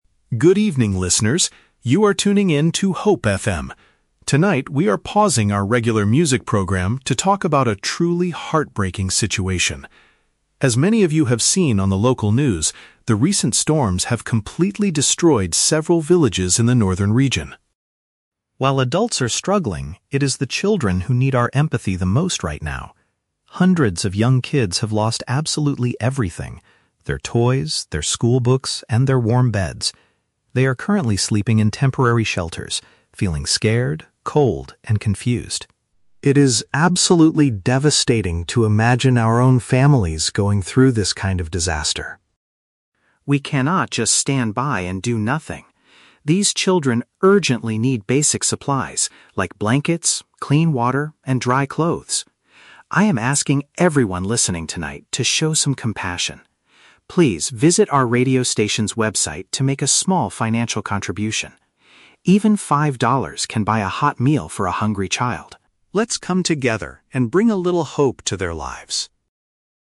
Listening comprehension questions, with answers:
Listen to a radio announcer making a special appeal. Choose the correct answer (A, B, or C) for each question.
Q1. Why did the radio station change its normal broadcast tonight?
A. To play a special selection of heartbreaking and emotional music.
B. To discuss a recent natural disaster and ask the public for help.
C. To interview several families living in the northern region.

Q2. According to the speaker, what is the current situation for the children?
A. They are staying in emergency housing without their personal belongings.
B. They are suffering from severe illnesses because of the cold weather.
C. They are studying at a new school because their old one was destroyed.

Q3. What does the speaker explicitly ask the listeners to do?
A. Bring food, water, and dry clothes directly to the radio station.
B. Travel to the affected villages to help build temporary shelters.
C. Give money via the internet to help provide essential items.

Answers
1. B
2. A
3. C

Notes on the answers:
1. The announcer says they are "pausing our regular music program to talk about a truly heartbreaking situation" regarding "recent storms" that "destroyed several villages." Option B is a perfect paraphrase. The Trap (A): The audio mentions "music program" and the word "heartbreaking," but they stopped the music to talk, not to play heartbreaking music. The Plausible (C): The "northern region" and "families" are mentioned, but the announcer is doing a monologue; there is no interview happening on the show.
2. The speaker says the children are "sleeping in temporary shelters" (emergency housing) and have "lost absolutely everything—their toys, their schoolbooks" (without personal belongings). The Trap (B): The announcer mentions they are "cold," but never states they have "severe illnesses." This is a common assumption (Plausible) but not in the audio. The Trap (C): "Schoolbooks" and "destroyed" are words in the script, but they are used in different sentences. The children lost their books; they are not at a new school.
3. The announcer asks listeners to "visit our radio station's website to make a small financial contribution." "Website" means via the internet, and "financial contribution" means giving money. The Trap (A): The audio mentions "blankets, clean water, and dry clothes" and the "radio station," but the speaker does NOT ask people to bring physical items to the station. She asks them to go online. The Plausible (B): Traveling to help build shelters is a great charity action, but the speaker only asks for a small donation of money ("Even five dollars").

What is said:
Announcer: Good evening, listeners. You are tuning in to Hope FM. Tonight, we are pausing our regular music program to talk about a truly heartbreaking situation. As many of you have seen on the local news, the recent storms have completely destroyed several villages in the northern region.
While adults are struggling, it is the children who need our empathy the most right now. Hundreds of young kids have lost absolutely everything—their toys, their schoolbooks, and their warm beds. They are currently sleeping in temporary shelters, feeling scared, cold, and confused. It is absolutely devastating to imagine our own families going through this kind of disaster.
We cannot just stand by and do nothing. These children urgently need basic supplies like blankets, clean water, and dry clothes. I am asking everyone listening tonight to show some compassion. Please visit our radio station's website to make a small financial contribution. Even five dollars can buy a hot meal for a hungry child. Let's come together and bring a little hope to their lives.

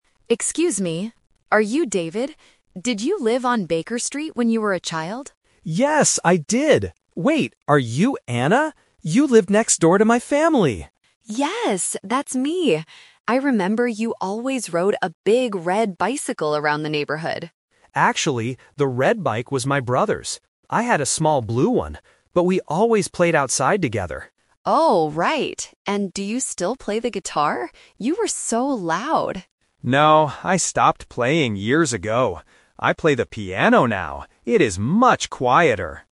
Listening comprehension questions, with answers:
Listen to a man and a woman talking on a train. Then, read the questions below and choose the correct answer (A, B, or C) for each question.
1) How did Anna and David know each other in the past?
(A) They were school classmates.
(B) They lived next to each other.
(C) They were in the same music band.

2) What kind of bicycle did David have when he was a child?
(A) A big red bicycle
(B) A fast black bicycle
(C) A small blue bicycle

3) What musical instrument does David play now?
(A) The guitar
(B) The piano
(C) The violin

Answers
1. B
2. C
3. B

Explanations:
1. David says to Anna, "You lived next door to my family!" Option (A) is a plausible relationship for people from the same neighborhood, but it is never mentioned in the audio. Option (C) is a trap; music (guitar/piano) is discussed later, but they were not in a band together.
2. David corrects Anna's memory by saying, "I had a small blue one." Option (A) is a trap; the big red bike is mentioned, but David says it belonged to his brother, not him. Option (B) is a plausible description of a bike, but it is not mentioned in the conversation.
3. David clearly states about his current hobby, "I play the piano now." Option (A) is a trap; he played the guitar when he was a child, but he says, "I stopped playing years ago." Option (C) is a common musical instrument but is never mentioned in the audio.

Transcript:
Anna: Excuse me, are you David? Did you live on Baker Street when you were a child?
David: Yes, I did! Wait... are you Anna? You lived next door to my family!
Anna: Yes, that's me! I remember you always rode a big red bicycle around the neighborhood.
David: Actually, the red bike was my brother's. I had a small blue one. But we always played outside together.
Anna: Oh, right! And do you still play the guitar? You were so loud!
David: No, I stopped playing years ago. I play the piano now. It is much quieter!

